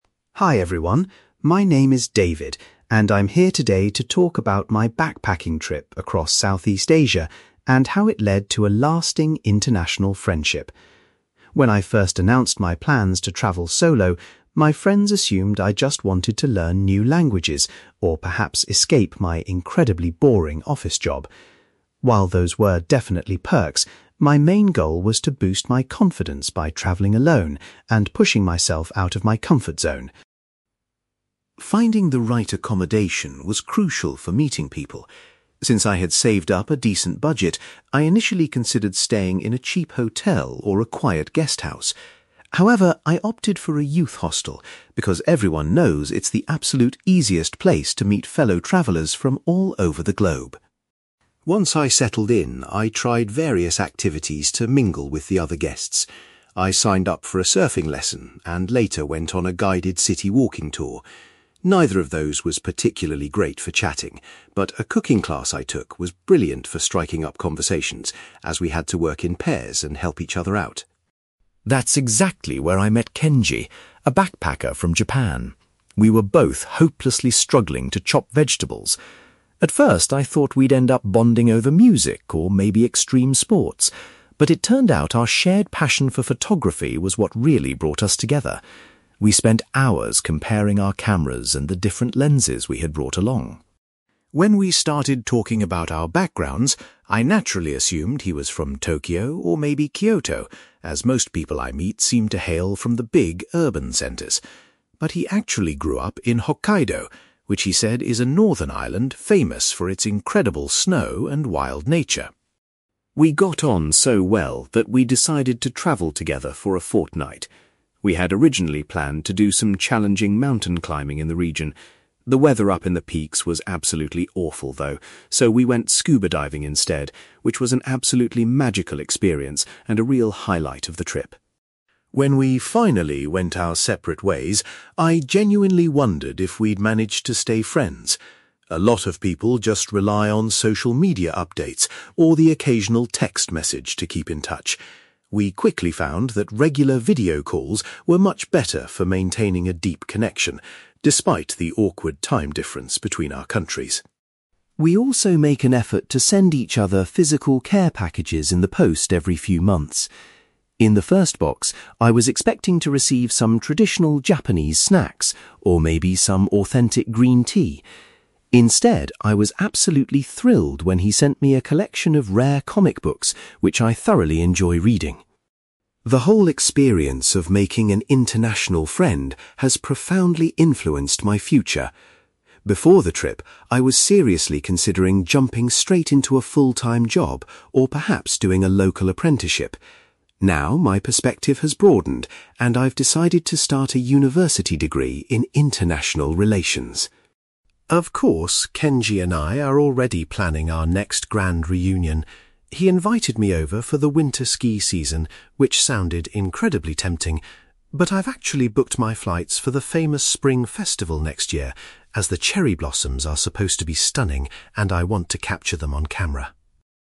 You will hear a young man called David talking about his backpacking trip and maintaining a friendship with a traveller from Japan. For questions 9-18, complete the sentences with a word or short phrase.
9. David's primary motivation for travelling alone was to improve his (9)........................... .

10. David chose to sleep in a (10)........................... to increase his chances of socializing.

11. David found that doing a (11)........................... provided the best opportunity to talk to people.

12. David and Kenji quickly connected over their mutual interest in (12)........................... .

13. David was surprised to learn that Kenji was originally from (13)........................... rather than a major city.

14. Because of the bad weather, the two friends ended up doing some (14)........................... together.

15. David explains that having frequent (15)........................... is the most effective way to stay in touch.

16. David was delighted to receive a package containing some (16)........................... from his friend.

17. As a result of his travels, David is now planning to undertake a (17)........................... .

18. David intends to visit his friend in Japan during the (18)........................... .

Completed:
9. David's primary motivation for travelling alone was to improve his confidence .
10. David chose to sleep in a youth hostel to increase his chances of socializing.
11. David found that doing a cooking class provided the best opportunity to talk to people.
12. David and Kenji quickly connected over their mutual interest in photography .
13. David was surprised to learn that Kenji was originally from Hokkaido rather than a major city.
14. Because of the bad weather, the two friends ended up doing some scuba diving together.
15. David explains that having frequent video calls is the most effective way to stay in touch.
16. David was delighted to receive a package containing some comic books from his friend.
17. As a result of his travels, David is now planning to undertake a university degree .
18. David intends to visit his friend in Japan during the spring festival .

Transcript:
David: Hi everyone, my name is David, and I'm here today to talk about my backpacking trip across Southeast Asia and how it led to a lasting international friendship. When I first announced my plans to travel solo, my friends assumed I just wanted to learn new languages or perhaps escape my incredibly boring office job. While those were definitely perks, my main goal was to boost my confidence by travelling alone and pushing myself out of my comfort zone.
Finding the right accommodation was crucial for meeting people. Since I had saved up a decent budget, I initially considered staying in a cheap hotel or a quiet guesthouse. However, I opted for a youth hostel because everyone knows it's the absolute easiest place to meet fellow travellers from all over the globe.
Once I settled in, I tried various activities to mingle with the other guests. I signed up for a surfing lesson and later went on a guided city walking tour. Neither of those was particularly great for chatting, but a cooking class I took was brilliant for striking up conversations, as we had to work in pairs and help each other out.
That's exactly where I met Kenji, a backpacker from Japan. We were both hopelessly struggling to chop vegetables! At first, I thought we'd end up bonding over music or maybe extreme sports, but it turned out our shared passion for photography was what really brought us together. We spent hours comparing our cameras and the different lenses we had brought along.
When we started talking about our backgrounds, I naturally assumed he was from Tokyo or maybe Kyoto, as most people I meet seem to hail from the big urban centres. But he actually grew up in Hokkaido, which he said is a northern island famous for its incredible snow and wild nature.
We got on so well that we decided to travel together for a fortnight. We had originally planned to do some challenging mountain climbing in the region. The weather up in the peaks was absolutely awful though, so we went scuba diving instead, which was an absolutely magical experience and a real highlight of the trip.
When we finally went our separate ways, I genuinely wondered if we'd manage to stay friends. A lot of people just rely on social media updates or the occasional text message to keep in touch. We quickly found that regular video calls were much better for maintaining a deep connection, despite the awkward time difference between our countries.
We also make an effort to send each other physical care packages in the post every few months. In the first box, I was expecting to receive some traditional Japanese snacks or maybe some authentic green tea. Instead, I was absolutely thrilled when he sent me a collection of rare comic books, which I thoroughly enjoy reading.
The whole experience of making an international friend has profoundly influenced my future. Before the trip, I was seriously considering jumping straight into a full-time job or perhaps doing a local apprenticeship. Now, my perspective has broadened, and I've decided to start a university degree in international relations.
Of course, Kenji and I are already planning our next grand reunion. He invited me over for the winter ski season, which sounded incredibly tempting. But I've actually booked my flights for the famous spring festival next year, as the cherry blossoms are supposed to be stunning and I want to capture them on camera.

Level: B2